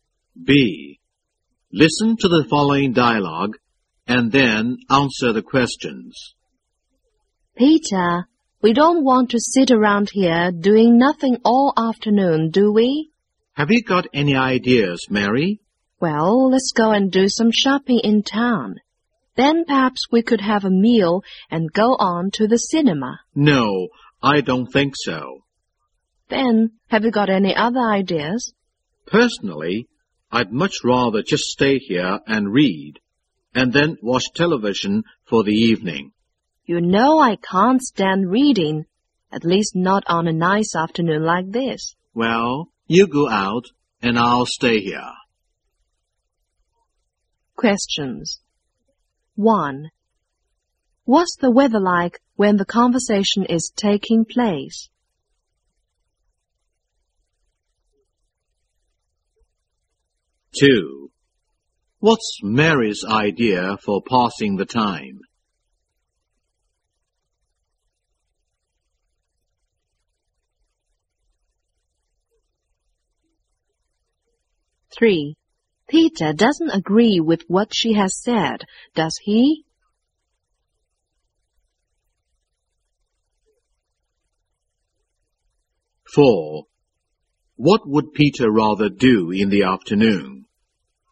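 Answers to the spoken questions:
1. It's a nice afternoon.
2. To go shopping in town, then have a meal and go to the cinema.
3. No, he doesn't.
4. Stay there and read.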